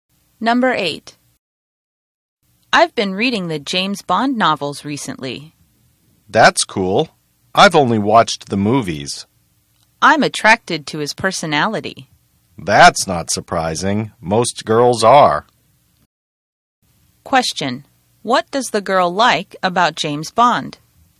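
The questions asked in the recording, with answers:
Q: What does the girl like about James Bond?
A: His personality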